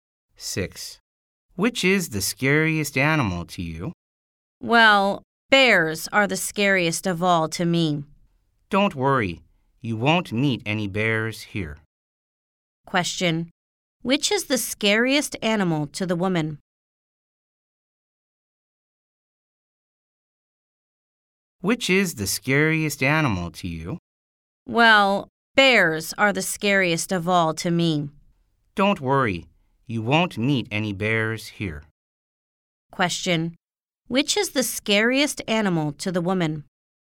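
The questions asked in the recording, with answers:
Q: Which is the scariest animal to the woman?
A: Bears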